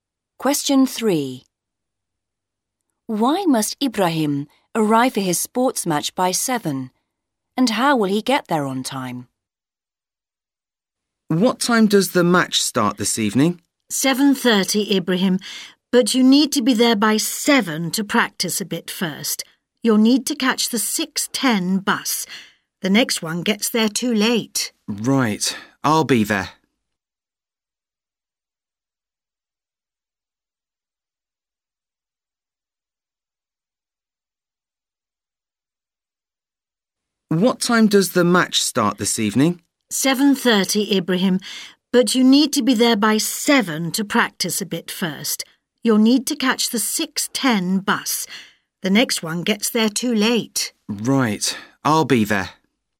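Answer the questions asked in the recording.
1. To practise a bit before the match
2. By catching the 6:10 bus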